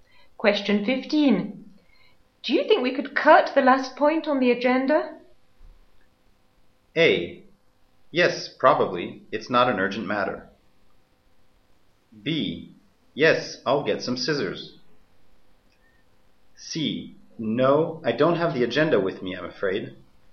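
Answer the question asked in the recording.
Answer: A: Yes, probably. It's not an urgent matter.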